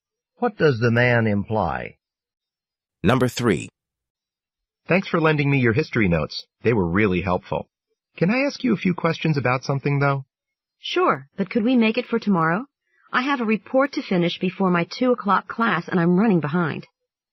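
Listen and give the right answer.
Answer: Finish her report.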